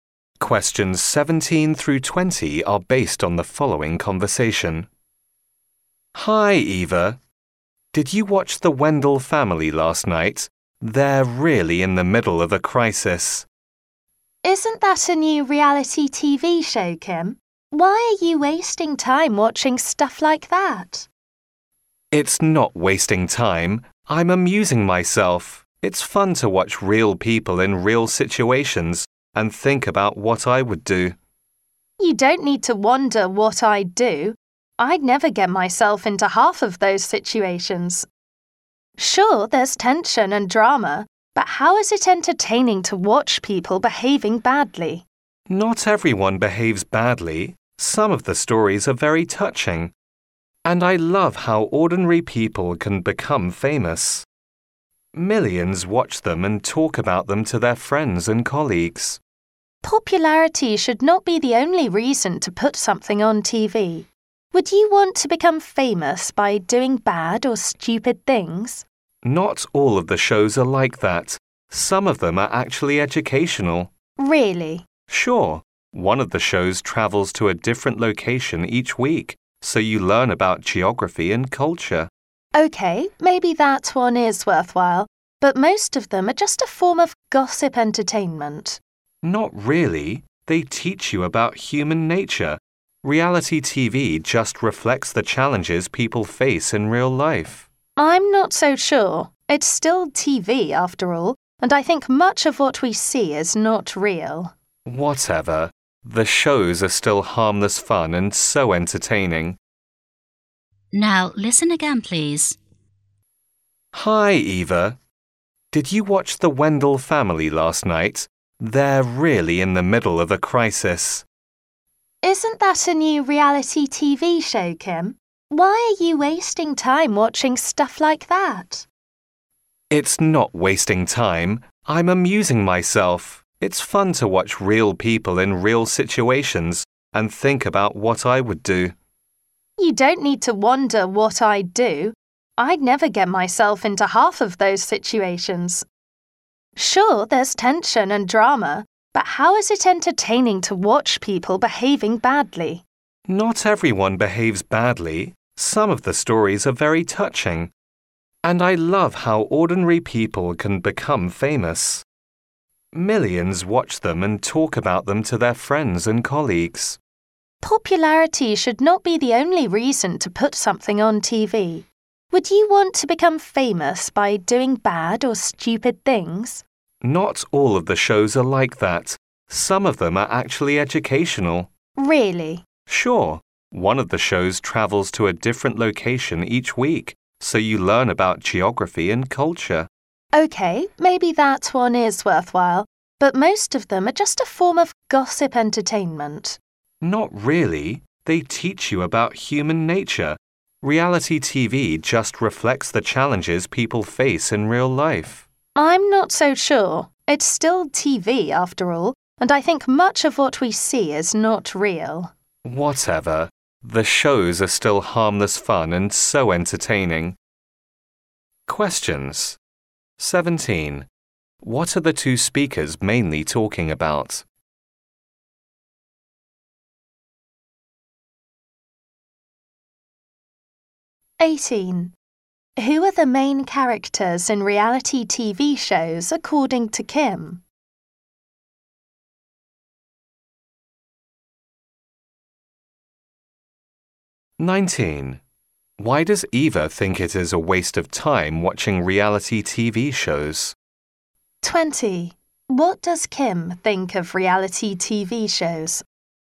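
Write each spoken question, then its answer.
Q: What are the two speakers mainly talking about?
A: Reality TV shows

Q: Who are the main characters in reality TV shows according to Kim?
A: Ordinary, real people

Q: What does Kim think of reality TV shows?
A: Harmless fun and entertaining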